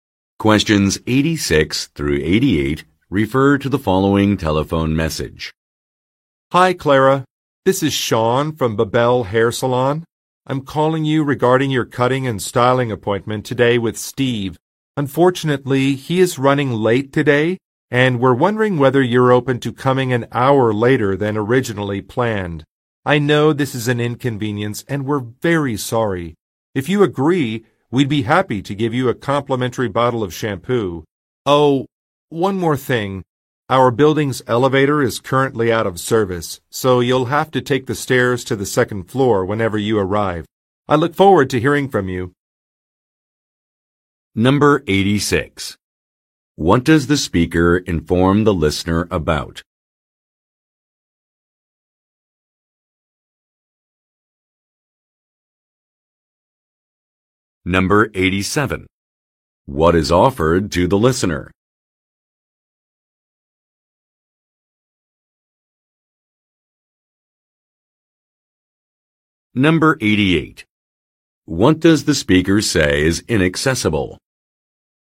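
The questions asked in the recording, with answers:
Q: What does the speaker inform the listener about?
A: Her appointment with Steve needs to be an hour later because he is running late

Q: What is offered to the listener?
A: A free bottle of shampoo

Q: What does the speaker say is inaccessible?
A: The building's elevator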